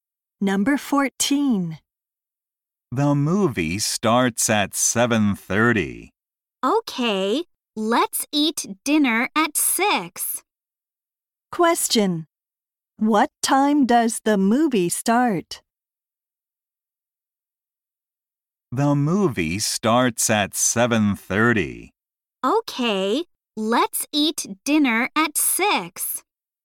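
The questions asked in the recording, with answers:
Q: Question. What time does the movie start?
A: At 7:30.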